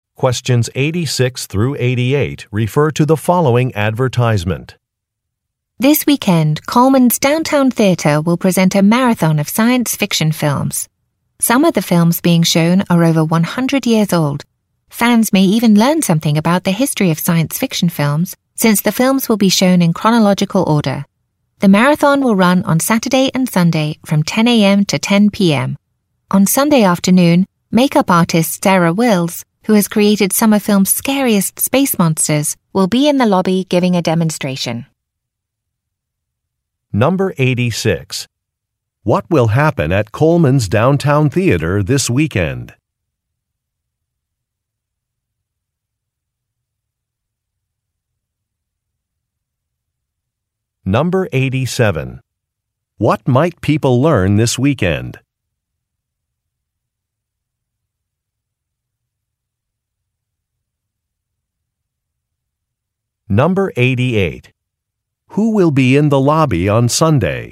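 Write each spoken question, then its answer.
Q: What will happen at Coleman's Downtown Theater this weekend?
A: A marathon of science fiction films will be shown

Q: What might people learn this weekend?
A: The history of science fiction films

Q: Who will be in the lobby on Sunday?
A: Makeup artist Sarah Wills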